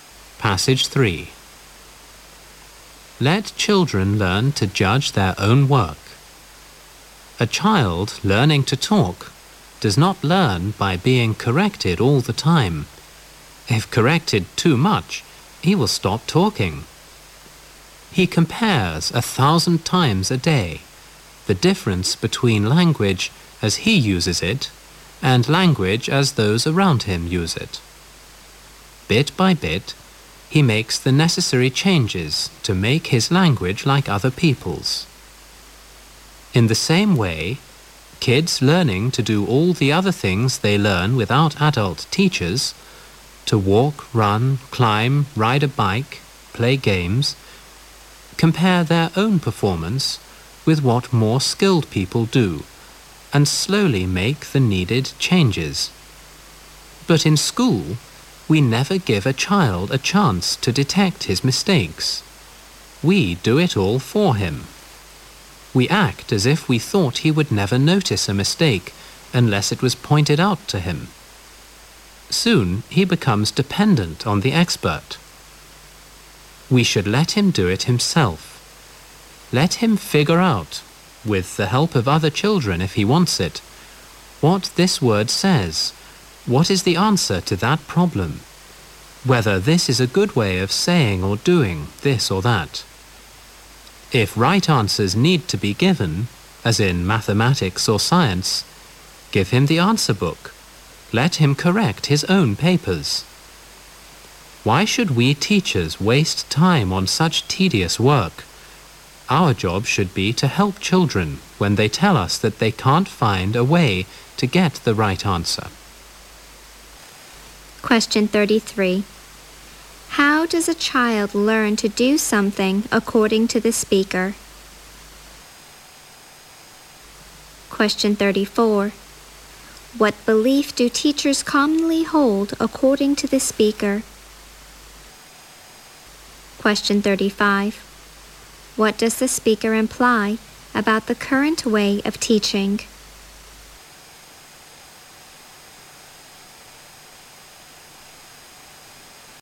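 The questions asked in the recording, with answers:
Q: How does a child learn to do something according to the speaker?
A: By comparing his own performance with what more skilled people do and slowly making the needed changes

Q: What belief do teachers commonly hold according to the speaker?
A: That a child would never notice a mistake unless it was pointed out to him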